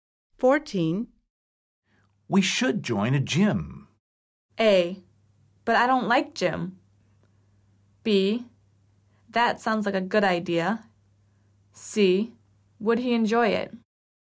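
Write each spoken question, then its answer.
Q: We should join a gym.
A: B: That sounds like a good idea.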